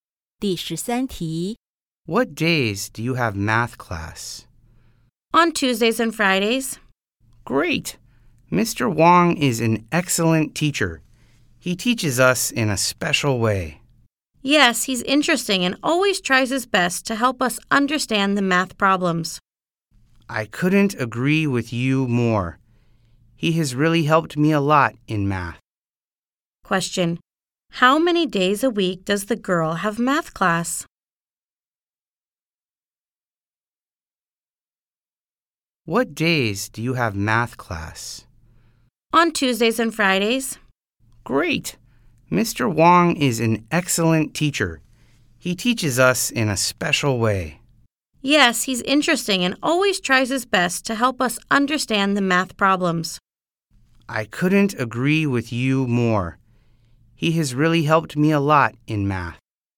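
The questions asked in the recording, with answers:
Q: How many days a week does the girl have math class?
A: Two days (Tuesdays and Fridays)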